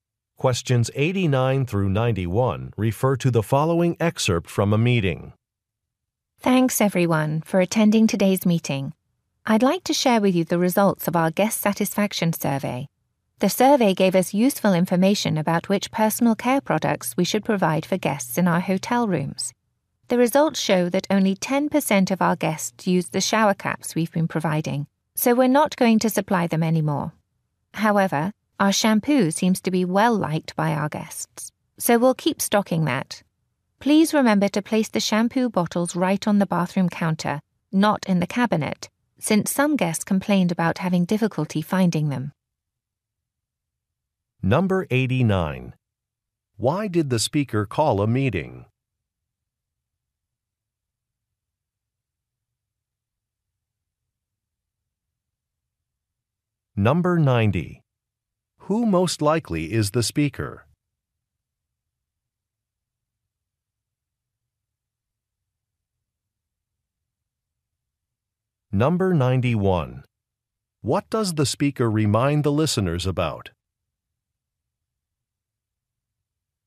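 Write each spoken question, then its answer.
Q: Why did the speaker call a meeting?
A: To share guest satisfaction survey results

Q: What does the speaker remind the listeners about?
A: To place shampoo bottles on the bathroom counter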